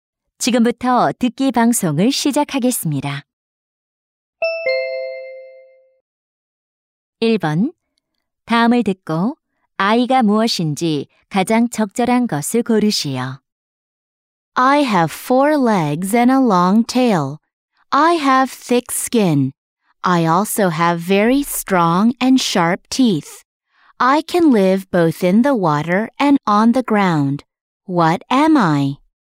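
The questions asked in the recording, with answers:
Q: 다음을 듣고 아이가 무엇인지 가장 적절한 것을 고르시오.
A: 악어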